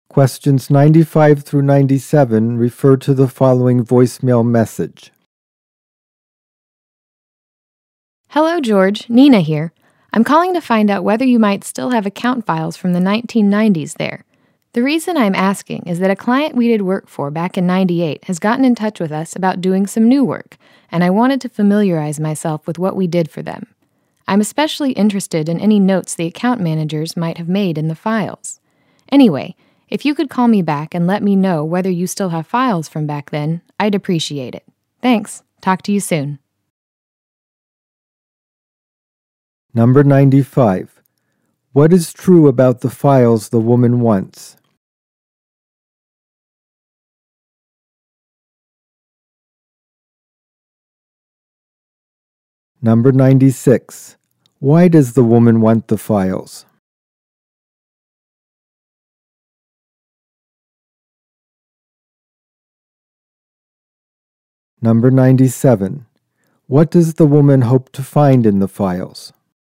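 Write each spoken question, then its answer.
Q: What is true about the files the woman wants?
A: They are from the 1990s

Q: Why does the woman want the files?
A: A former client wants new work done

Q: What does the woman hope to find in the files?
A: Notes made by the account managers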